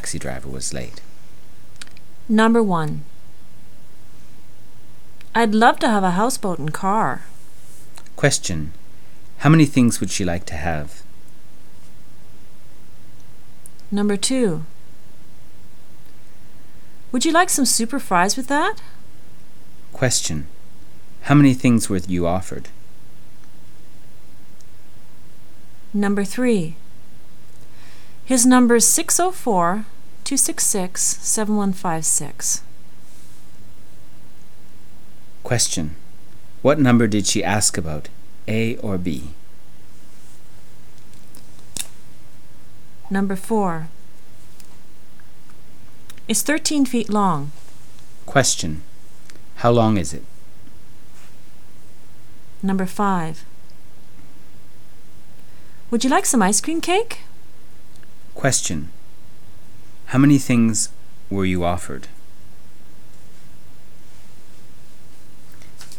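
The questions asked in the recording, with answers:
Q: How long is it?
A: 13 feet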